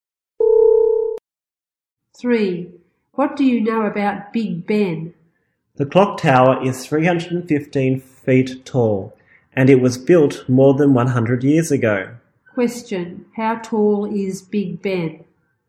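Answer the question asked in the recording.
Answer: 315 feet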